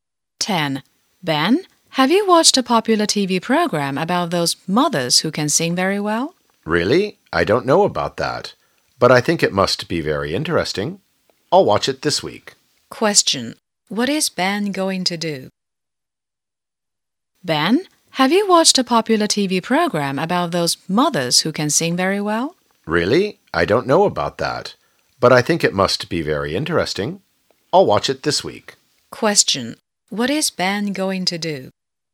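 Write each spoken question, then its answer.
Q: What is Ben going to do?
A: Watch the TV program about mothers who sing well this week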